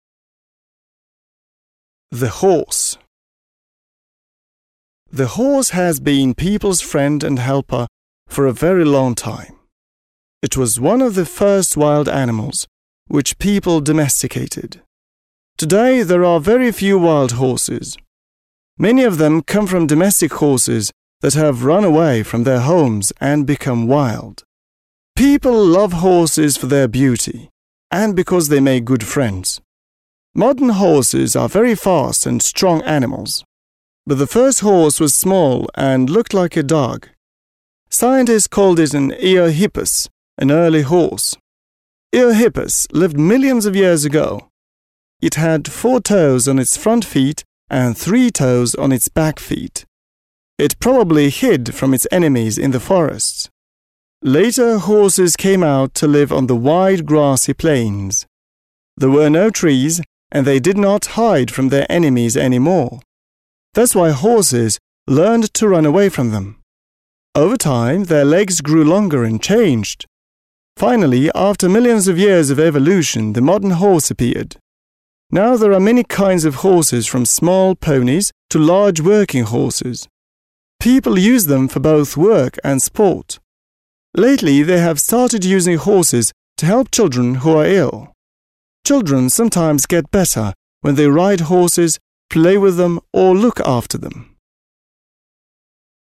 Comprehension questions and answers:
Listen and say which statements are true and which are false.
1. Horses have lived on the Earth for millions of years.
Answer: True

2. Now there are no wild horses any more.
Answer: False

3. The first horses were fast and strong animals.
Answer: False

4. The first horses didn't live on the plains.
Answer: True

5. Horses' legs changed because of their new lifestyle.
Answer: True

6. Horses can be "doctors".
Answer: True

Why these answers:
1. В тексте говорится: «Eohippus lived millions of years ago» (Эогиппус жил миллионы лет назад). Эогиппус — это предок современной лошади.
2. Это утверждение неверно, так как в тексте сказано: «Today there are very few wild horses» (Сегодня существует очень мало диких лошадей). «Мало» (very few) не означает «совсем нет» (no ... any more).
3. В тексте есть противопоставление: «Modern horses are very fast and strong... But the first horse was small and looked like a dog» (Современные лошади очень быстрые и сильные... Но первая лошадь была маленькой и похожей на собаку).
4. Текст подтверждает это: «It probably hid from its enemies in the forests. Later horses came out to live on the wide grassy plains» (Она, вероятно, пряталась от врагов в лесах. Позже лошади вышли жить на широкие травянистые равнины).
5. Слово lifestyle здесь подразумевает смену среды обитания (из леса на равнину).

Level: 7 класс